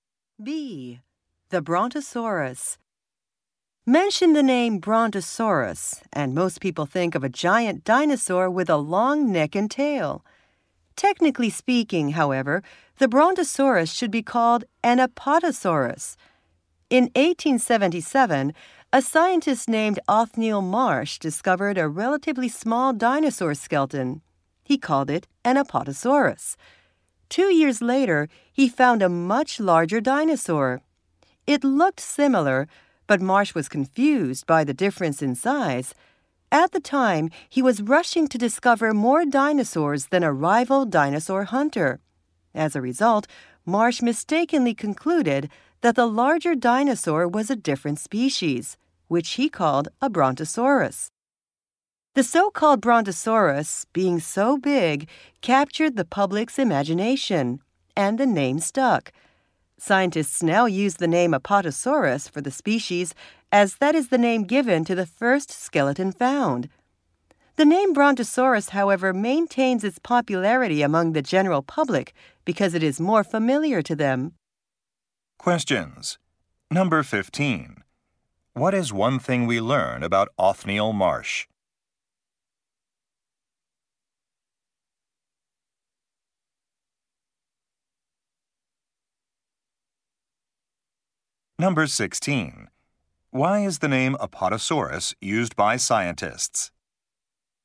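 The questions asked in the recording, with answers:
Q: What is one thing we learn about Othniel Marsh?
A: While rushing to beat a rival, he mistakenly named the larger skeleton as a new species.

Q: Why is the name Apatosaurus used by scientists?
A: It was the name given to the first skeleton found.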